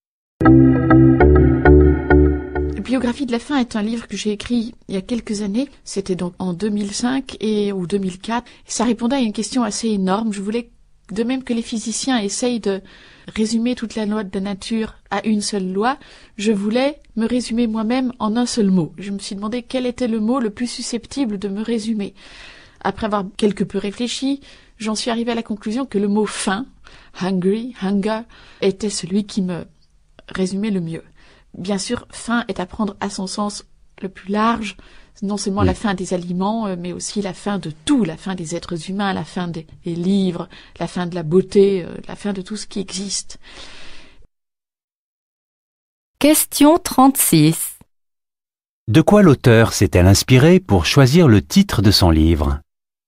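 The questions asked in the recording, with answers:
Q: De quoi l'auteur s'est-elle inspirée pour choisir le titre de son livre?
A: Du mot « faim », celui qui la résume le mieux.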